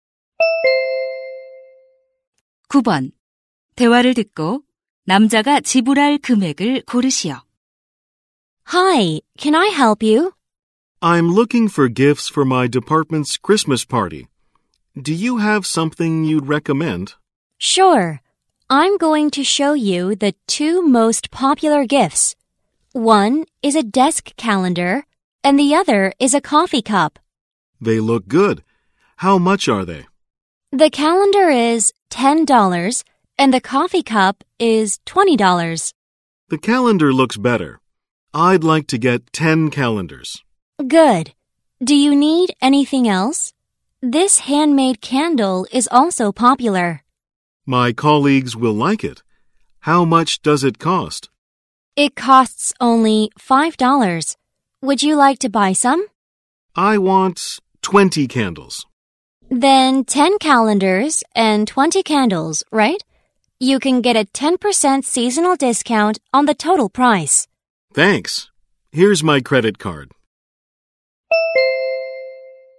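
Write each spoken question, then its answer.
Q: 대화를 듣고 남자가 지불할 금액을 고르시오.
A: $180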